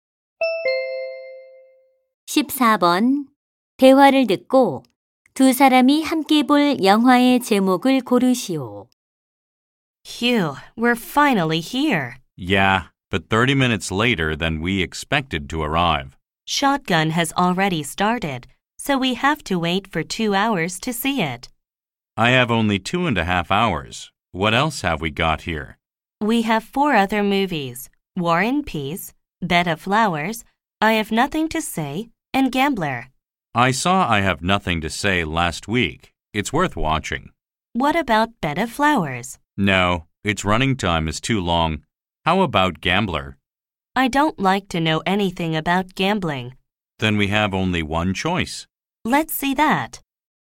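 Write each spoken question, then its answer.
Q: 대화를 듣고 두 사람이 함께 볼 영화의 제목을 고르시오.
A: War and Peace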